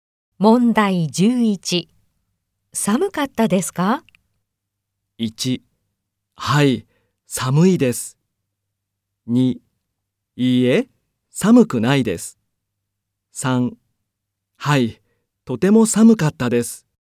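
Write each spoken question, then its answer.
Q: 寒かったですか?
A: 3: はい、とても寒かったです。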